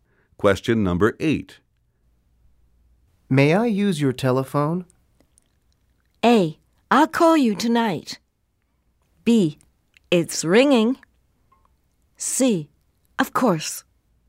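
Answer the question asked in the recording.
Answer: C: Of course.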